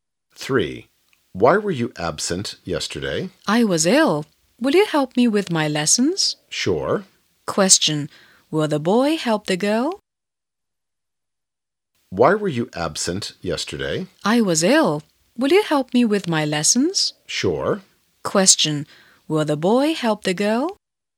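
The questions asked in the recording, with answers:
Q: Question, will the boy help the girl?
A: Yes, he will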